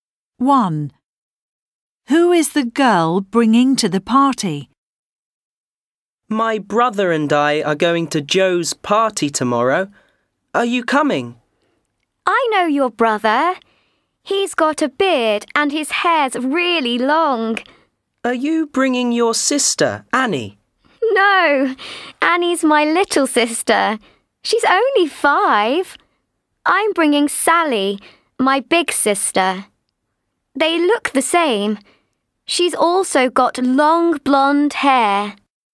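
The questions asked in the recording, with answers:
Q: Who is the girl bringing to the party?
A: Sally, her big sister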